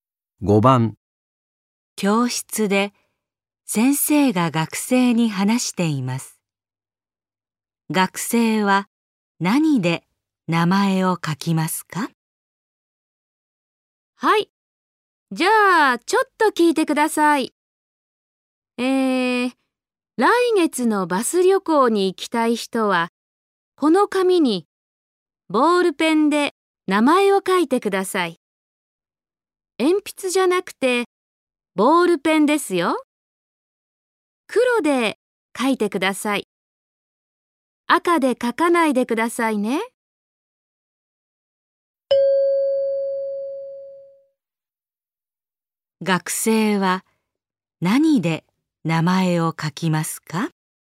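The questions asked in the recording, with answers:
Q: 学生は何で名前を書きますか?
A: 黒のボールペン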